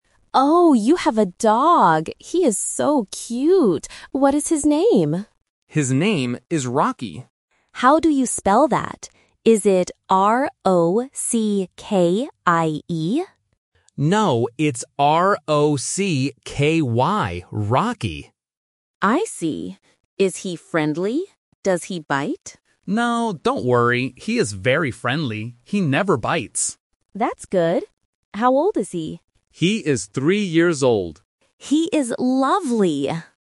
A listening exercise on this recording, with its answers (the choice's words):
Listen to the conversation and circle the correct answer (A, B, or C).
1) What is the dog's name?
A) Rickie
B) Rocky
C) Ronnie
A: Rocky

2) Does the dog bite?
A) Yes, sometimes.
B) No, never.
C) Only when he is hungry.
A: No, never.

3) How old is the dog?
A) 2 years old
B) 3 years old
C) 4 years old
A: 3 years old

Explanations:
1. The guest asks for the spelling. The owner clarifies: "It's R-O-C-K-Y." Option A (Rickie) is a trap because the guest guessed that spelling first.
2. The owner explicitly says, "He never bites." Option A is a common distractor but incorrect. Option C is not mentioned in the dialogue.
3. The owner says, "He is three years old." Option A and C are plausible numbers for a dog's age but are not mentioned in the script.

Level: A1